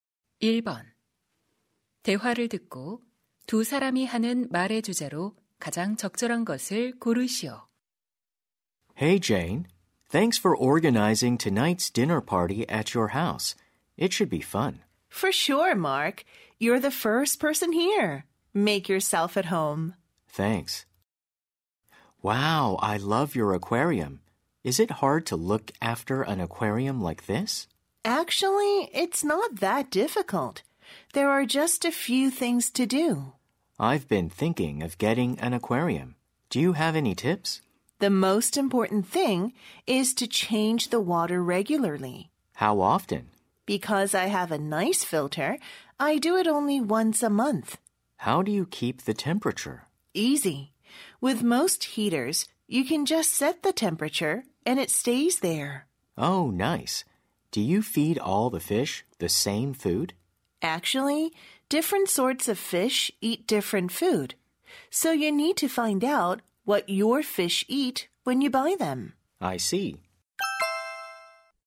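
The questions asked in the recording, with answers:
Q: 대화를 듣고 두 사람이 하는 말의 주제로 가장 적절한 것을 고르시오.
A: 수족관 관리 방법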